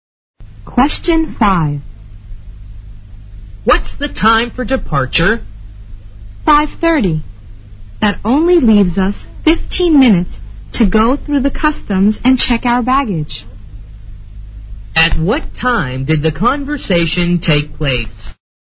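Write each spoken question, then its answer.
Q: At what time did the conversation take place?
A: 5:15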